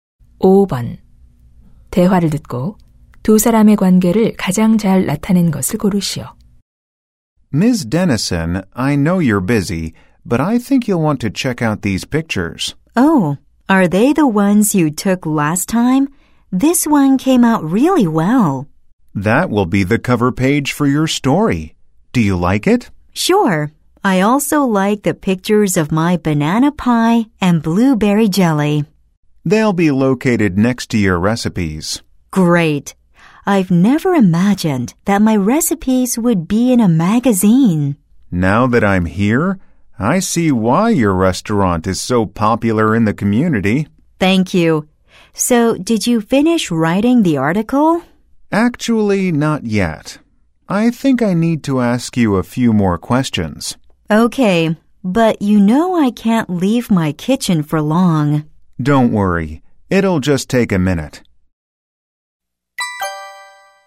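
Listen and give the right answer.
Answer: 잡지 기자(사진작가) - 식당 요리사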